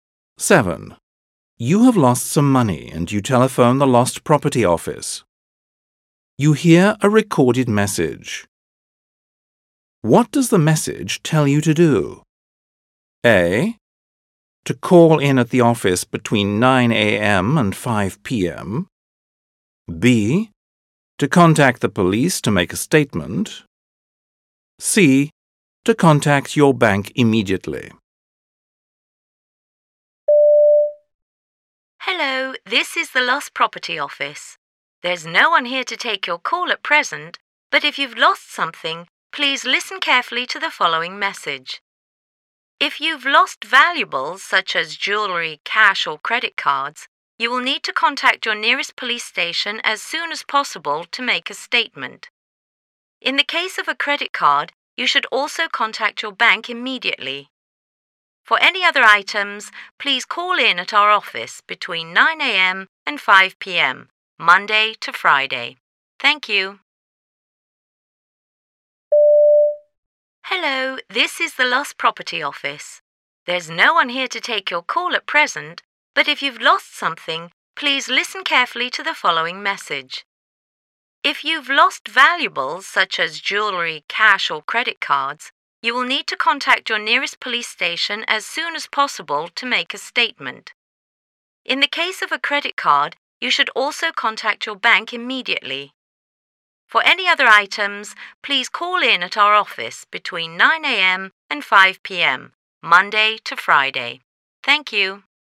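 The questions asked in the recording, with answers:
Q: What does the message tell you to do?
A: B: To contact the police to make a statement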